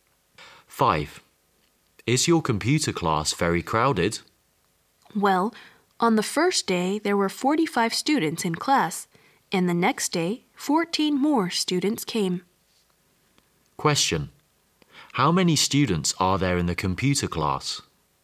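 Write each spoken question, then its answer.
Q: How many students are there in the computer class?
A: 59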